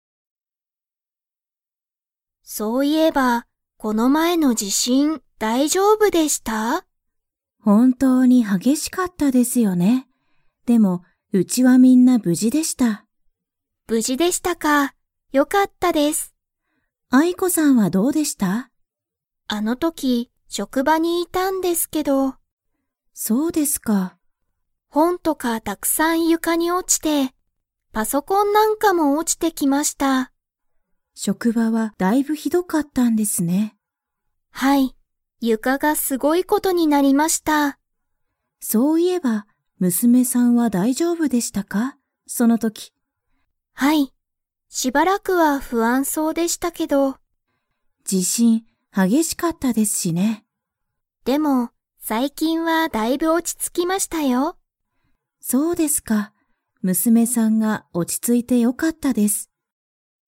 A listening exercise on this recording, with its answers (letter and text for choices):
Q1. 地震じしんの時とき、アイコはどこにいましたか?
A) 家いえ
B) 職場しょくば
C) お店みせ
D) 大学だいがく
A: B) 職場しょくば

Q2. アイコの娘むすめは、今いま 。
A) だいぶ落おち着ついた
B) ずっと不安ふあんそうだ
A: A) だいぶ落おち着ついた

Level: Level 4